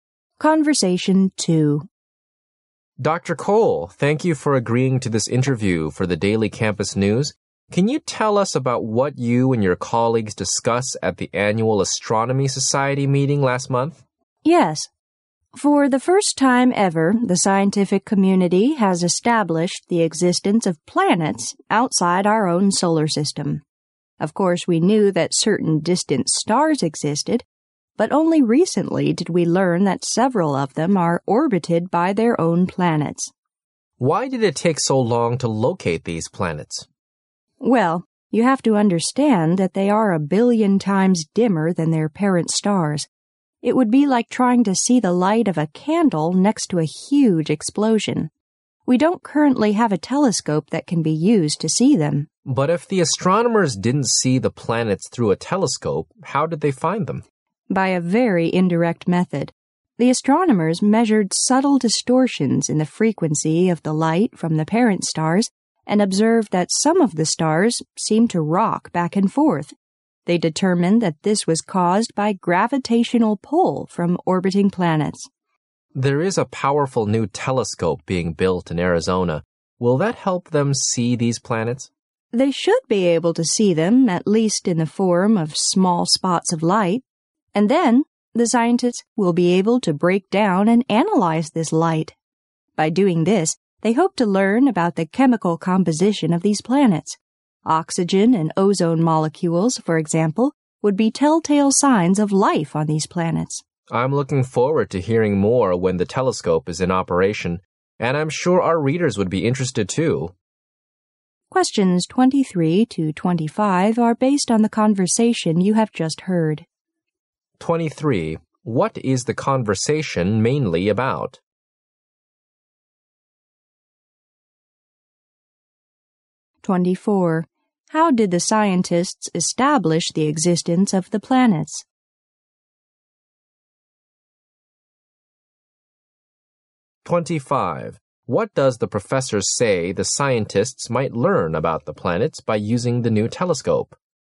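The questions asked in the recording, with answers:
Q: What is the conversation mainly about?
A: The discovery of planets outside our solar system

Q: How did the scientists establish the existence of the planets?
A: By measuring distortions in the light from the parent stars

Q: What does the professor say the scientists might learn about the planets by using the new telescope?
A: Their chemical composition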